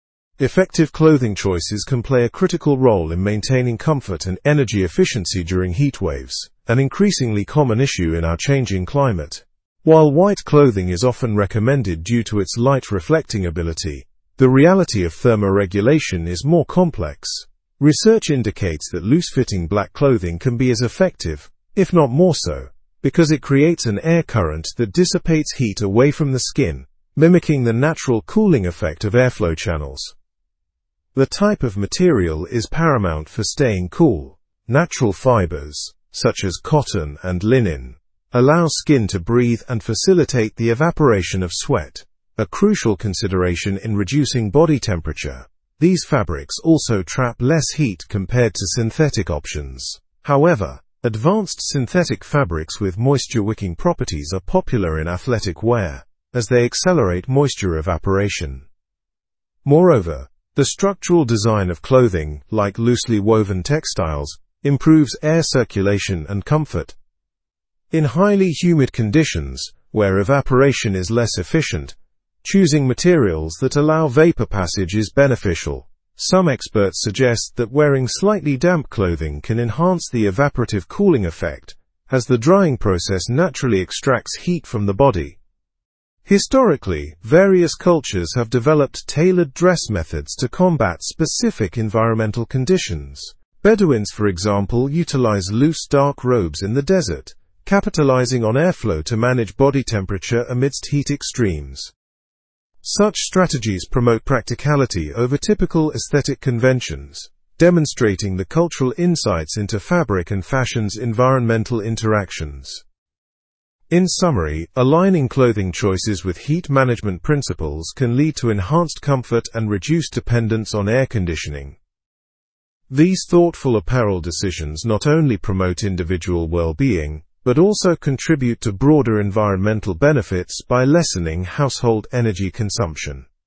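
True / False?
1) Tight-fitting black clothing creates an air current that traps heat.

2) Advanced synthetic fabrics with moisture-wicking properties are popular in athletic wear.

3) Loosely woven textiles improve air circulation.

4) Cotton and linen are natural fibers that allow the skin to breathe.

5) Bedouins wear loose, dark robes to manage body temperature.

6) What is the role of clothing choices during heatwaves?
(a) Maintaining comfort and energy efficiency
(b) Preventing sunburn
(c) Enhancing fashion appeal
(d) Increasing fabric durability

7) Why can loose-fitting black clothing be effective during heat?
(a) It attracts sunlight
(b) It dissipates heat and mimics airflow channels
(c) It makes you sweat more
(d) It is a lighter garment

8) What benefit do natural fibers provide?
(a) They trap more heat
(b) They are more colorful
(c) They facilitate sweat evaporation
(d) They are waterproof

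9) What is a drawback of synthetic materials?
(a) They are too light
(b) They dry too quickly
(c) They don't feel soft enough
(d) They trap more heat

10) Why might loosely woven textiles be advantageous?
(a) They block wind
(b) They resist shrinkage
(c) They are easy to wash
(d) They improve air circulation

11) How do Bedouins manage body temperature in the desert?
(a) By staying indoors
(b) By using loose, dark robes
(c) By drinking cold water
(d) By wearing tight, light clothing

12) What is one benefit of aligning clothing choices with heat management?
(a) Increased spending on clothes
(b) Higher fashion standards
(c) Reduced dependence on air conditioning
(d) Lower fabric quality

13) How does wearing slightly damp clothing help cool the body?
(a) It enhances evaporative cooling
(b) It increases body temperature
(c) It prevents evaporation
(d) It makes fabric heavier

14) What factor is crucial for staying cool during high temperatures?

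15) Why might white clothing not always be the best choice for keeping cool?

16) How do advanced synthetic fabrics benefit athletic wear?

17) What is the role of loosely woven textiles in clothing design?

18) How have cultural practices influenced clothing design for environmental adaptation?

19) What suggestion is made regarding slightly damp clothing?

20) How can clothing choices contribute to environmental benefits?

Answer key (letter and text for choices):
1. False
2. True
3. True
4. True
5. True
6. (a) Maintaining comfort and energy efficiency
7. (b) It dissipates heat and mimics airflow channels
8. (c) They facilitate sweat evaporation
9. (d) They trap more heat
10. (d) They improve air circulation
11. (b) By using loose, dark robes
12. (c) Reduced dependence on air conditioning
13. (a) It enhances evaporative cooling
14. The type of material, such as natural fibers
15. Loose black clothing creates an air current that dissipates heat
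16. Their moisture-wicking properties accelerate moisture evaporation
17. They improve air circulation and comfort
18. Cultures developed tailored dress, e.g. Bedouins' loose dark robes
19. It can enhance the evaporative cooling effect
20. By reducing dependence on air conditioning and household energy use

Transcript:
Effective clothing choices can play a critical role in maintaining comfort and energy efficiency during heatwaves, an increasingly common issue in our changing climate. While white clothing is often recommended due to its light-reflecting ability, the reality of thermoregulation is more complex. Research indicates that loose-fitting black clothing can be as effective, if not more so, because it creates an air current that dissipates heat away from the skin, mimicking the natural cooling effect of airflow channels.
The type of material is paramount for staying cool. Natural fibers, such as cotton and linen, allow skin to breathe and facilitate the evaporation of sweat, a crucial consideration in reducing body temperature. 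These fabrics also trap less heat compared to synthetic options. However, advanced synthetic fabrics with moisture-wicking properties are popular in athletic wear, as they accelerate moisture evaporation.
Moreover, the structural design of clothing, like loosely woven textiles, improves air circulation and comfort. In highly humid conditions, where evaporation is less efficient, choosing materials that allow vapor passage is beneficial. Some experts suggest that wearing slightly damp clothing can enhance the evaporative cooling effect, as the drying process naturally extracts heat from the body.
Historically, various cultures have developed tailored dress methods to combat specific environmental conditions. Bedouins, for example, utilize loose, dark robes in the desert, capitalizing on airflow to manage body temperature amidst heat extremes. Such strategies promote practicality over typical aesthetic conventions, demonstrating the cultural insights into fabric and fashion's environmental interactions.
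In summary, aligning clothing choices with heat management principles can lead to enhanced comfort and reduced dependence on air conditioning. These thoughtful apparel decisions not only promote individual well-being but also contribute to broader environmental benefits by lessening household energy consumption.

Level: Level 4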